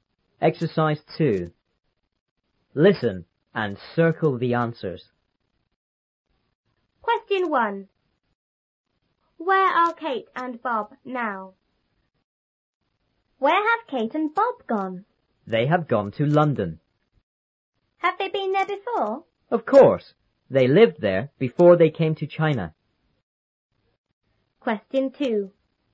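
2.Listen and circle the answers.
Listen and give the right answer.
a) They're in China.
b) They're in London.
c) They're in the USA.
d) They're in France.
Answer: b) They're in London.

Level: 初中英语广州版3B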